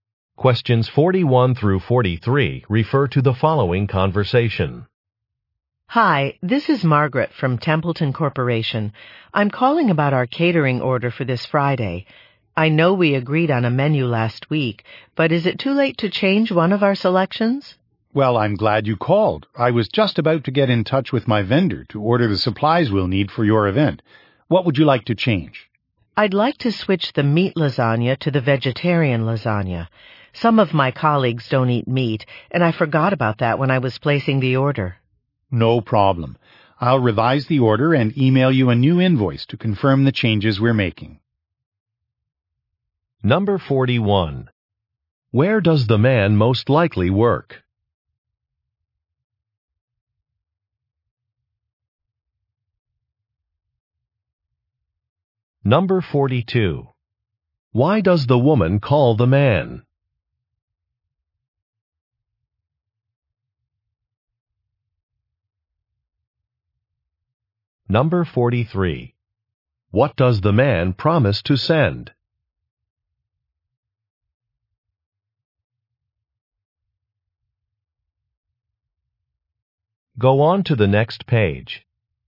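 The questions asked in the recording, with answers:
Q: Where does the man most likely work?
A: At a catering company

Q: Why does the woman call the man?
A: To change a menu selection

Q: What does the man promise to send?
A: A new invoice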